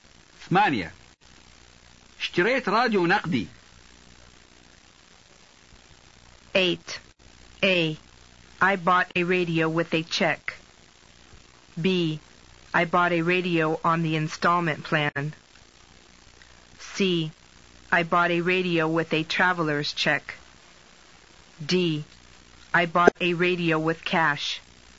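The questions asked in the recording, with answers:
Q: اشتريت راديو نقدي.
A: D: I bought a radio with cash.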